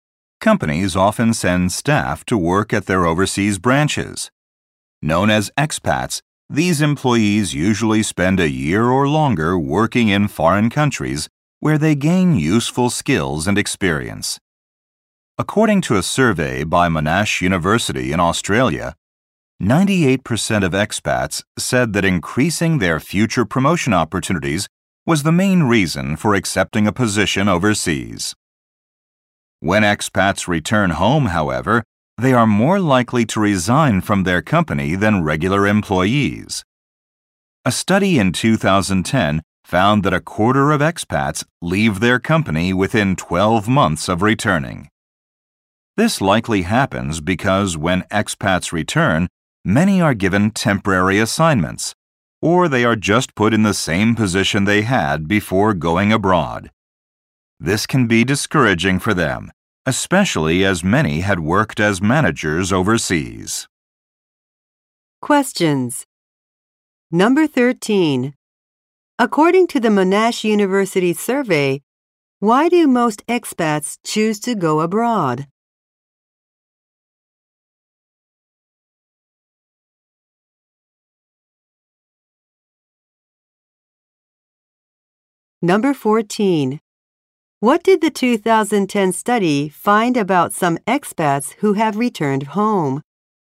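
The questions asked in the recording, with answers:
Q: According to the Monash University survey, why do most expats choose to go abroad?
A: To improve their chances of future promotion.

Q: What did the 2010 study find about some expats who have returned home?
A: A quarter of them leave their company within 12 months of returning.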